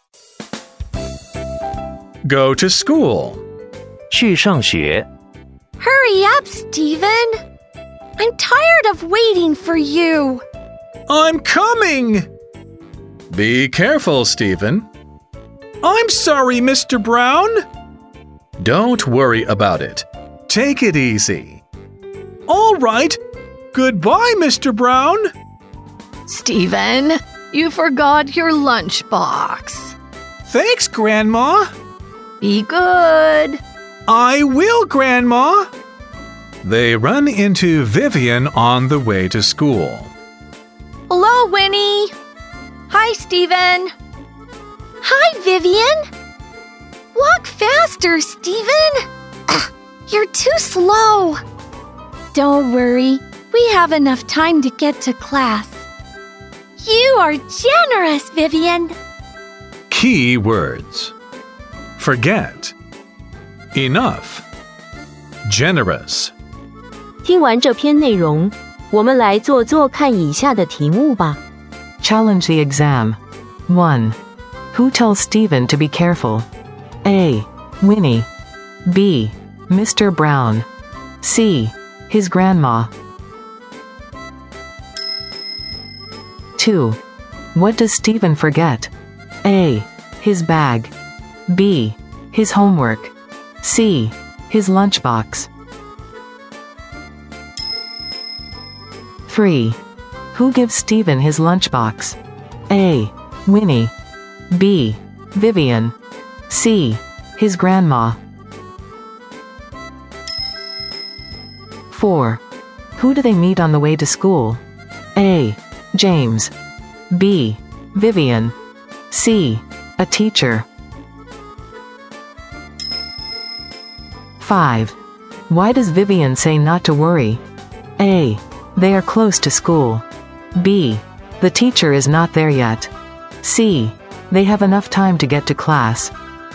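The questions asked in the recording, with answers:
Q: Who tells Stephen to be careful?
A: B: Mr. Brown.

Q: What does Stephen forget?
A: C: His lunchbox.

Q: Who gives Stephen his lunchbox?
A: C: His grandma.

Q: Who do they meet on the way to school?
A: B: Vivian.

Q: Why does Vivian say not to worry?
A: C: They have enough time to get to class.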